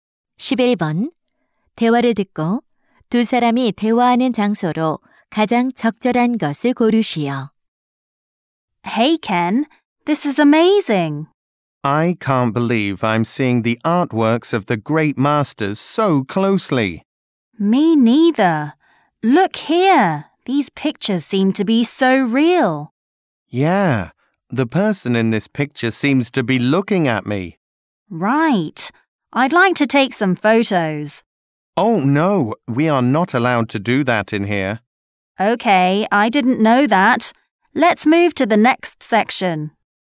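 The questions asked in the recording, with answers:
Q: 대화를 듣고 두 사람이 대화하는 장소로 가장 적절한 것을 고르시오.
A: 미술관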